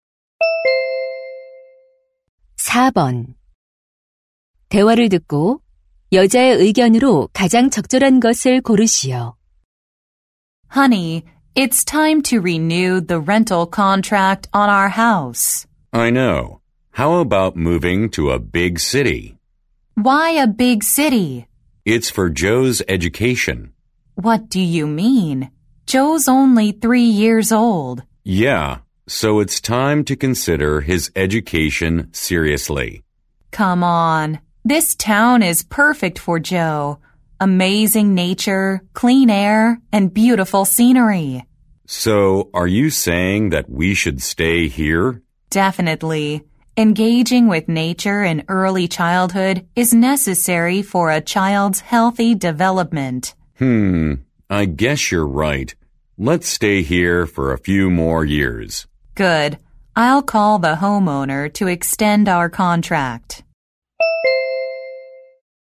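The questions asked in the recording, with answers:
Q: 대화를 듣고 여자의 의견으로 가장 적절한 것을 고르시오.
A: 어린 시절 자연과 함께하는 것은 아이의 건강한 발달에 필요하다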